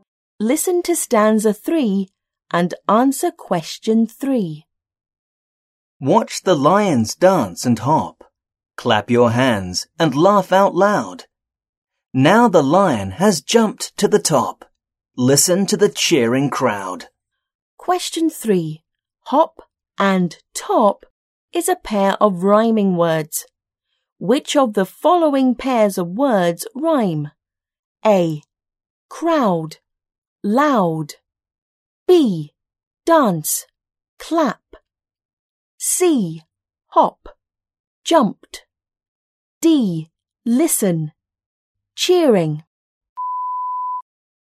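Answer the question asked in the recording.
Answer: A: Crowd. Loud.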